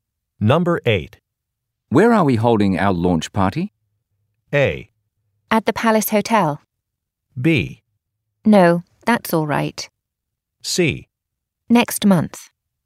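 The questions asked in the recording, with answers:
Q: Where are we holding our launch party?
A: A: At the Palace Hotel.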